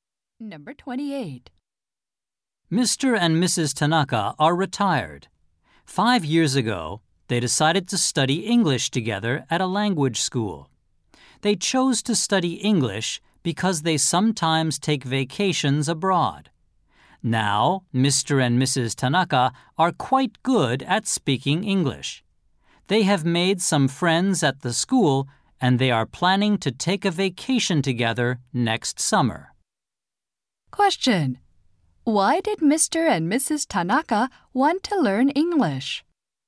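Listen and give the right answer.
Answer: They sometimes take vacations abroad.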